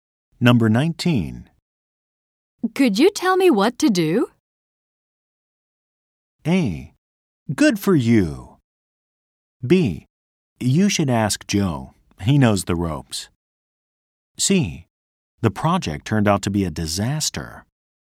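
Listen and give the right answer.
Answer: B: You should ask Joe. He knows the ropes.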